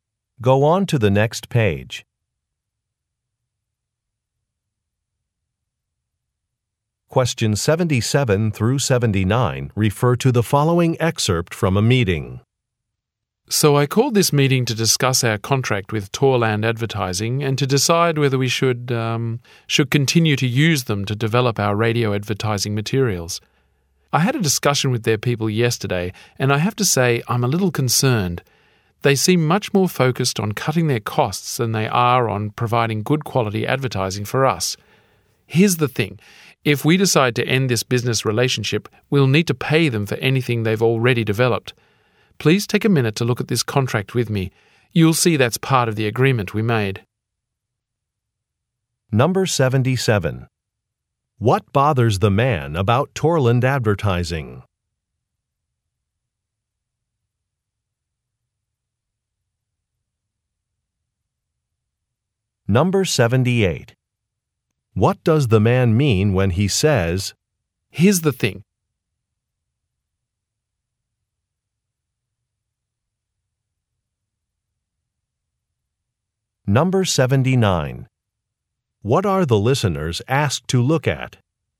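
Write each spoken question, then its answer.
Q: What bothers the man about Torland Advertising?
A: They focus more on cutting costs than on quality

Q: What are the listeners asked to look at?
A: The contract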